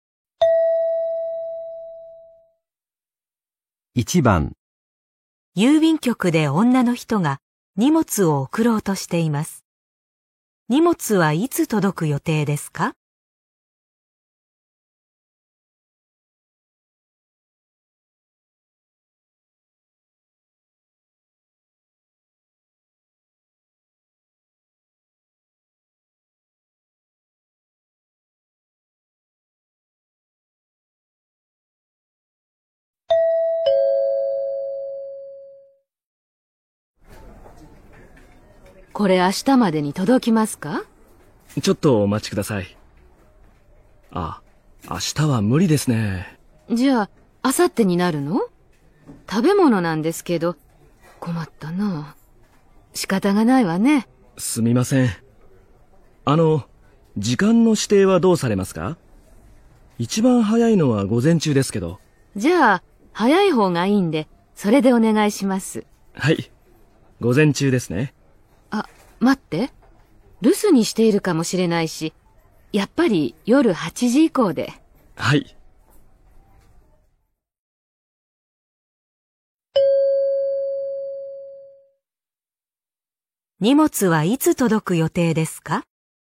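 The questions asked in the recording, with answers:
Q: 荷物はいつ届く予定ですか?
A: 明後日の夜8時以降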